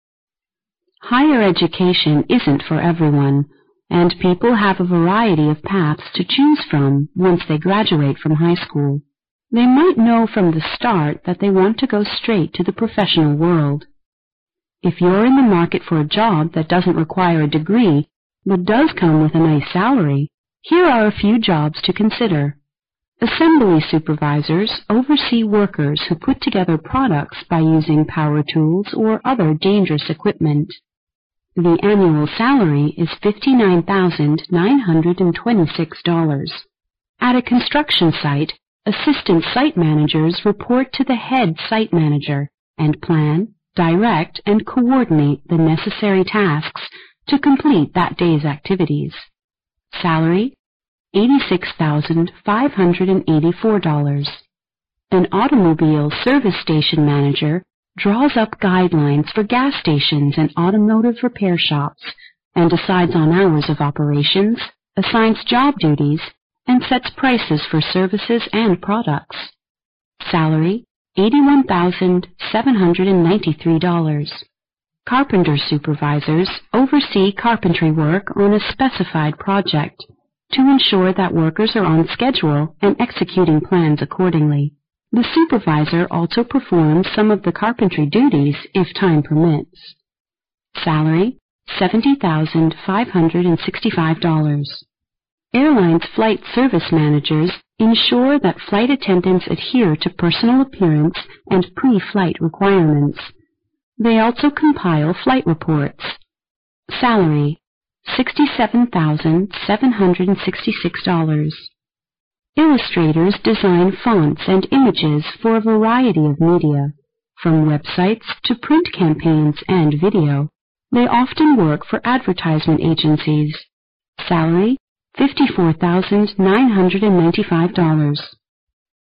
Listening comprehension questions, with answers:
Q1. Which job will involve supervising workers using dangerous equipment?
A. Assistant site manager.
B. Carpenter supervisor.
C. Assembly supervisor.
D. Automobile service station manager.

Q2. Who will also decide on the prices of products and services?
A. Airlines' flight service manager.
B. Automobile service station manager.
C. Assistant site manager.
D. Carpenter supervisor.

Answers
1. C
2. B

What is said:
[听力原文] Higher education isn't for everyone and people have a variety of parts to choose from once they graduate from high school. They might know from the start that they want to go street to the professional world. If you're in the market for a job that doesn't require a degree but does come with a nice salary, here are a few jobs to consider: Assembly supervisors oversee workers who put together products by using power tools or other dangerous equipment; the annual salary is $59,926. At construction side assistant site managers report to the head site manager and plan, direct and coordinate the necessary tasks to complete that day's activities. Salary: $86,584. And automobile service station manager draws up guidelines for gas stations and automobile repair shops and decides on our operations, a signs of job duties, and sets prices for services and products. Salary: $81,793. Carpenter supervisors oversee carpentry work on a specify project to ensure that workers on schedule and executing the plan accordingly.

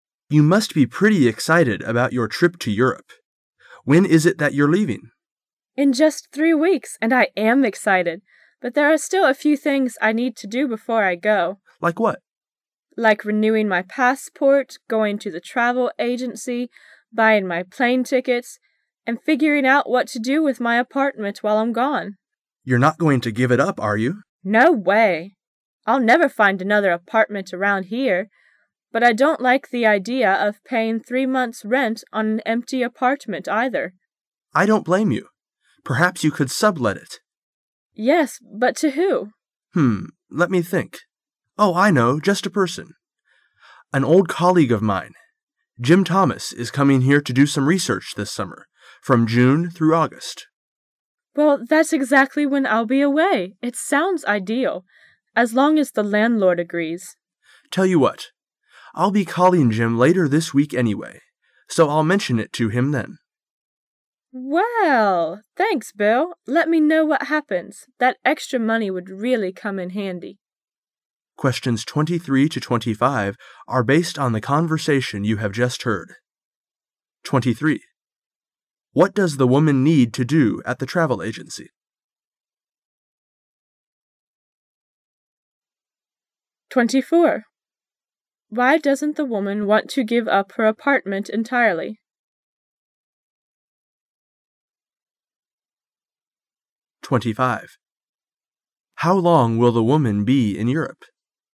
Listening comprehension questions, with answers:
Questions 23 to 25 arc based on the conversation you have just heard.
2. Why doesn't the woman want to give up her apartment entirely?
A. She doesn't have time to move.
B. She would have difficulty finding another apartment.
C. She's paid her rent for the summer in advance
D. She doesn't want to paint another apartment.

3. How long will the woman be in Europe?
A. Three weeks.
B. One month.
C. Three months.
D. Over a year.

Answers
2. B
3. C

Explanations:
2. [解题思路] 细节题,关于如何处置her apartment 的 [详细解答] The man said:" You're not going to give it up,are you?" The woman said:"No way! I'll never find another..."从对话知道B是对的。
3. [解题思路] 推论题,是关于时间的。 [详细解答] 是关于the women在欧洲呆多久。the man建议她转租给他的朋友,说他的朋友今年夏天来这做研究,from June through August。The women said:" That's exactly when I'll be away。"因此可以肯定她在欧洲呆三个月。

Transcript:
[解析] 23-25 M: You must be pretty excited about your trip to Europe. When is it that you're leaving? W: In just three weeks. And I am excited! But there are still a few things I need to do before I go. M: Like what? W: Like renewing my passport, going to the travel agency, buying my plane tickets, and figuring out what to do with my apartment while I'm gone. M: Yon' re not going to give it up, are you? W: No way! I'll never find another apartment around here! But I don't like the idea of paying three month's rent on an empty apartment, either. M: I don't blame you. Perhaps you could sublet it. W: Yes, but who to? M: Hmm, let me think. Oh, I know, just a person. An old colleague of mine, Jim Thomas is coming here to do some research this summer, from June through August. W: Well, that's exactly when I'll be away. It sounds ideal. As long as the landlord agrees. M: Tell you what. I'll be calling Jim later this week anyway, so I'll mention it to him then. Let me know what happens. That extra money would really come in handy. 23.What does the woman need to do at the travel agency?

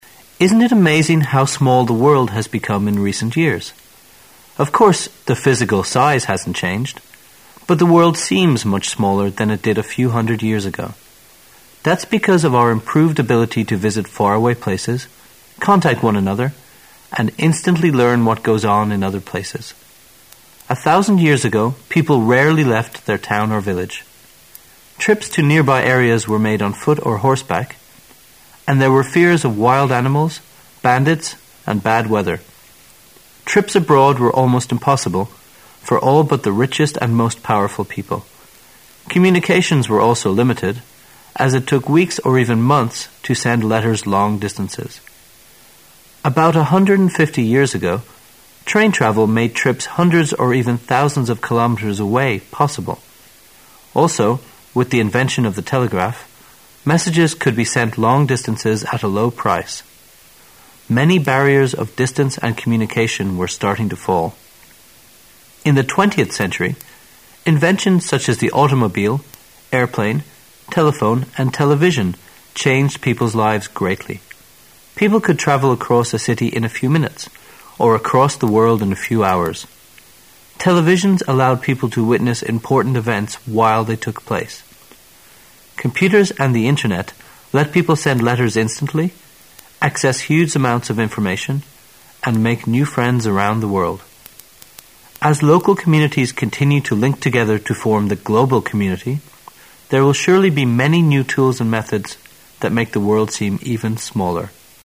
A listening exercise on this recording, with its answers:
Questions 14 to 17 are based on the following passage. At the end of the passage, you will be given 20 seconds to answer the questions. Now listen to the passage.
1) Which of the following statements is NOT true about life 150 years ago?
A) Travelling long distances were easier than before.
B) Messages could be sent quickly.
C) Crossing the ocean could be done safely.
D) The fear of wild animals became a big barrier of communication.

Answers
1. D

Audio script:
[解析] 14-17 Isn't it amazing how small the world has become in recent years? Of course, the physical size hasn't changed, but the world seems much smaller than it did a few hundred years ago. That's because of our improved ability to visit faraway places, contact one another, and instantly learn what goes on in other places. A thousand years ago, people rarely left their town or village. Trips to nearby areas were made on foot or horseback, and there were fears of wild animals, bandits, and bad weather. Trips abroad were almost impossible for all but the richest and most powerful people. Communications were also limited, as it took weeks or even months to send letters long distances. About 150 years ago, train travel made trips hundreds or even thousands of kilometers away possible. Also, with the invention of the telegraph, messages could be sent long distances at a low price. Many barriers of distance and communication were starting to fall. In the 20th century, inventions such as the automobile, airplane, telephone, and television changed people's lives greatly. People could travel across a city in a few minutes or across the world in a few hours. Televisions allowed people to witness important events while they took place. Computers and the Internet let people send letters instantly, access huge amounts of information, and make new friends around the world. As local communities continue to link together to form the global community, there will surely be many new tools and methods that make the world seem even smaller.

